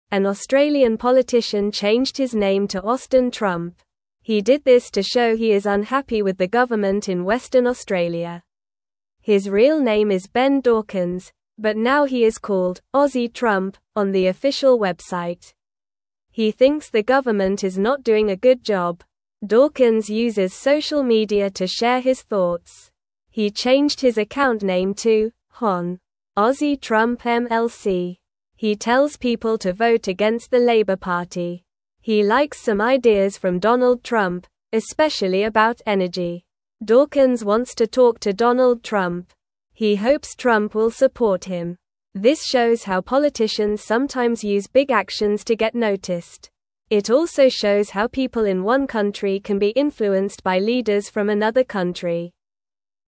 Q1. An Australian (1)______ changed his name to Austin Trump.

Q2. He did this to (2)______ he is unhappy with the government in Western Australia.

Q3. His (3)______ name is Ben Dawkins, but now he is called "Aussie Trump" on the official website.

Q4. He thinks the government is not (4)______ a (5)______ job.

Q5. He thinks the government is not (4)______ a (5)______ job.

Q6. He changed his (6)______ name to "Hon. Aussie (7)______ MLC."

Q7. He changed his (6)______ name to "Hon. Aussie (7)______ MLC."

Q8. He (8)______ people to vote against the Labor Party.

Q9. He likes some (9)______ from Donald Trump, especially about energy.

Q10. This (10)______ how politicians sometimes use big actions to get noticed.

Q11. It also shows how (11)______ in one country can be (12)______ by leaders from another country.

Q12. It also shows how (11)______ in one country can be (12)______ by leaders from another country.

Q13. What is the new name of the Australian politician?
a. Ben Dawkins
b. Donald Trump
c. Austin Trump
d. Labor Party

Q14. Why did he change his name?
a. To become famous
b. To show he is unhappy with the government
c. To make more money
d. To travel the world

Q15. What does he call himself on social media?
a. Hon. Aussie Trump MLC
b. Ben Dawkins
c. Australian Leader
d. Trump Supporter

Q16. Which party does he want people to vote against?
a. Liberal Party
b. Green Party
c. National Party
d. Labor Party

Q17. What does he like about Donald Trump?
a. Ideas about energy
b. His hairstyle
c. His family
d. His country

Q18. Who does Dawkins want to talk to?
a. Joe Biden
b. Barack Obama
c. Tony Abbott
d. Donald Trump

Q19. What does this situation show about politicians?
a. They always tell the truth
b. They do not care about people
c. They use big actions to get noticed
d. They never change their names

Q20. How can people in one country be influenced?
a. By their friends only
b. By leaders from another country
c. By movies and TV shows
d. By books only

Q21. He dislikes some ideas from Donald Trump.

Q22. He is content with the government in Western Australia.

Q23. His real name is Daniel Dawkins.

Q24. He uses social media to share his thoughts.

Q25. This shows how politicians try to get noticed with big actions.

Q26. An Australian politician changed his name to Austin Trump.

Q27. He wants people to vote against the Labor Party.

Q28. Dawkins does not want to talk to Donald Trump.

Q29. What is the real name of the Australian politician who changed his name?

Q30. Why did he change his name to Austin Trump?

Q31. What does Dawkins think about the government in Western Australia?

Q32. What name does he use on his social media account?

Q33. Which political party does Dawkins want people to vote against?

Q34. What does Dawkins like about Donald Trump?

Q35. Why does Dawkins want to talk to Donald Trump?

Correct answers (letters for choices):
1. politician
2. show
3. real
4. doing
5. good
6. account
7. Trump
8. tells
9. ideas
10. shows
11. people
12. influenced
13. c
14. b
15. a
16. d
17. a
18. d
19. c
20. b
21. False
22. False
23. False
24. True
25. True
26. True
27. True
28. False
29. His real name is Ben Dawkins.
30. He changed his name to show he is unhappy with the government in Western Australia.
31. He thinks the government is not doing a good job.
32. He uses the name "Hon. Aussie Trump MLC" on his social media account.
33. He wants people to vote against the Labor Party.
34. He likes some ideas from Donald Trump, especially about energy.
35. He hopes Trump will support him.

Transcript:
He did this to show he is unhappy with the government in Western Australia. His real name is Ben Dawkins, but now he is called "Aussie Trump" on the official website. He thinks the government is not doing a good job.
Dawkins uses social media to share his thoughts. He changed his account name to "Hon. Aussie Trump MLC." He tells people to vote against the Labor Party. He likes some ideas from Donald Trump, especially about energy.
Dawkins wants to talk to Donald Trump. He hopes Trump will support him. This shows how politicians sometimes use big actions to get noticed. It also shows how people in one country can be influenced by leaders from another country.

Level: Level 2